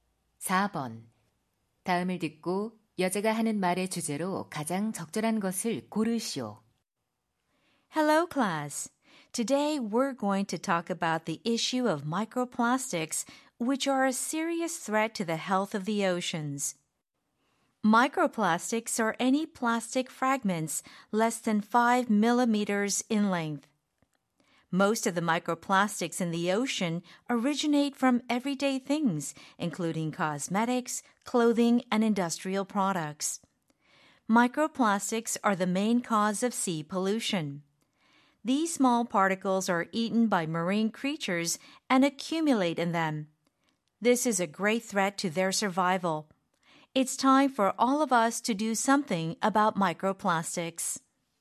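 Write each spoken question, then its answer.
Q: 다음을 듣고 여자가 하는 말의 주제로 가장 적절한 것을 고르시오.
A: 미세플라스틱이 해양 건강에 미치는 위협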